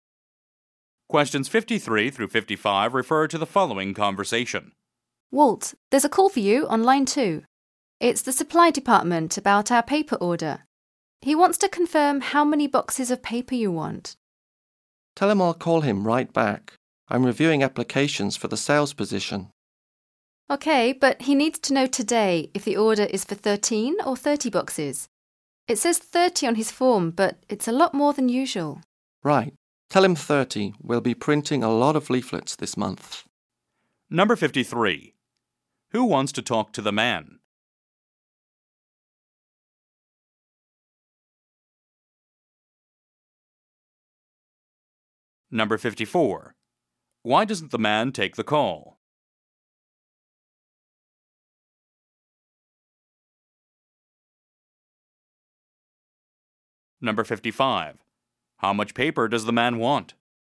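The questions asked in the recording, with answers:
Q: Who wants to talk to the man?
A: The supply department

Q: Why doesn't the man take the call?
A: He is reviewing applications for the sales position

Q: How much paper does the man want?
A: 30 boxes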